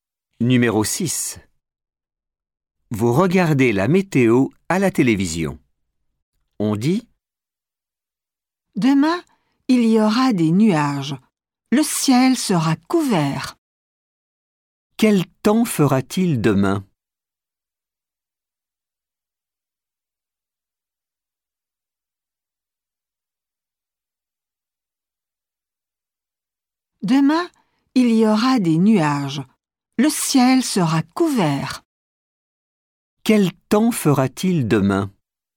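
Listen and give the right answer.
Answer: Il y aura des nuages, le ciel sera couvert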